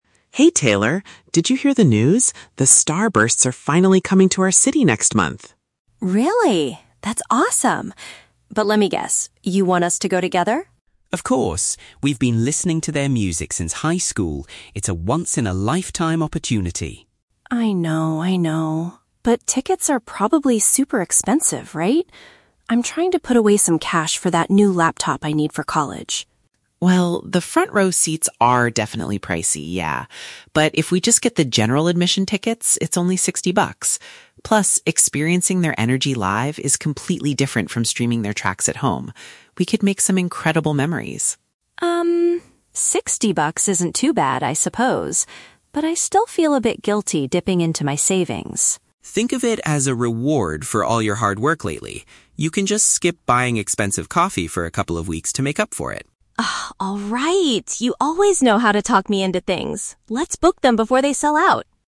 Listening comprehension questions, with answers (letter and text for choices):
Listen to the conversation between two friends and choose the correct answer (A, B, or C) for each question.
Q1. Why is Taylor initially hesitant to go to the concert?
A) She is currently saving up to buy a computer for her studies.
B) She thinks the band's live performances are usually disappointing.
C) She has already spent too much money on coffee this month.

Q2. What is Alex's main argument to persuade Taylor?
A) The front row seats are currently on a special discount.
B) Seeing the band perform in person will be an unforgettable experience.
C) Alex promises to pay for Taylor's ticket as a reward for her hard work.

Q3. What do they finally agree to do?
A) They will wait a few weeks to see if the ticket prices drop.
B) They will use Taylor's savings to buy the most expensive VIP passes.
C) They will purchase the standard entry tickets immediately.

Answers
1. A) She is currently saving up to buy a computer for her studies.
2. B) Seeing the band perform in person will be an unforgettable experience.
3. C) They will purchase the standard entry tickets immediately.

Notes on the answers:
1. Taylor says she is "trying to put away some cash for that new laptop I need for college." ("Put away some cash" is a paraphrase for "saving up", and "laptop" is a type of "computer").
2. Alex argues that "experiencing their energy live is completely different" and they will "make some incredible memories" (which paraphrases to "an unforgettable experience").
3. They decide to get "general admission tickets" (standard entry tickets), and Taylor says "Let's book them before they sell out!" (meaning they will buy them immediately).

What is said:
Alex: Hey Taylor! Did you hear the news? The Starbursts are finally coming to our city next month!
Taylor: Really? That's awesome. But let me guess, you want us to go together?
Alex: Of course! We've been listening to their music since high school. It's a once-in-a-lifetime opportunity.
Taylor: I know, I know. But tickets are probably super expensive, right? I'm trying to put away some cash for that new laptop I need for college.
Alex: Well, the front row seats are definitely pricey, yeah. But if we just get the general admission tickets, it's only 60 bucks. Plus, experiencing their energy live is completely different from streaming their tracks at home. We could make some incredible memories!
Taylor: Um, 60 bucks isn't too bad, I suppose. But I still feel a bit guilty dipping into my savings.
Alex: Think of it as a reward for all your hard work lately. You can just skip buying expensive coffee for a couple of weeks to make up for it.
You always know how to talk me into things. Let's book them before they sell out!